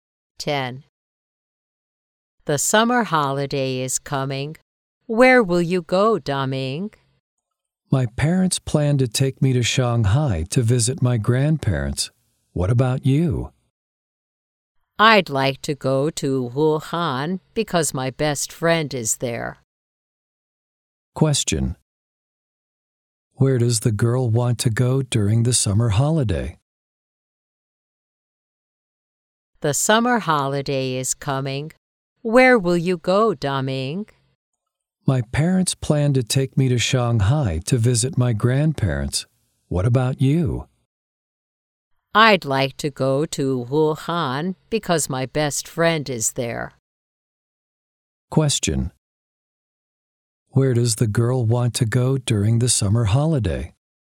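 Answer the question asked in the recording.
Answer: Wuhan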